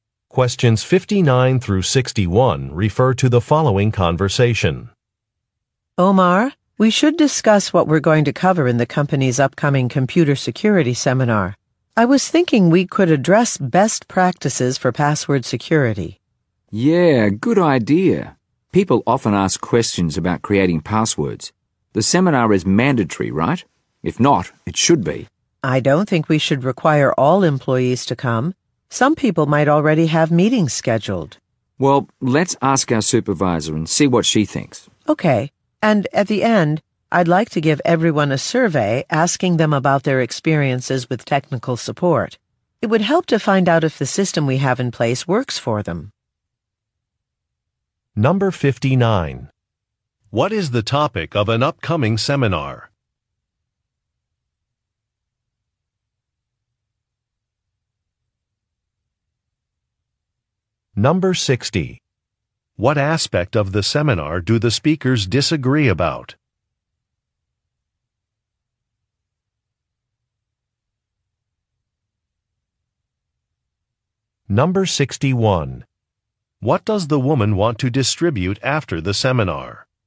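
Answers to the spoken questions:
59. Computer security (password security)
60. Whether attendance should be mandatory
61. A survey about technical support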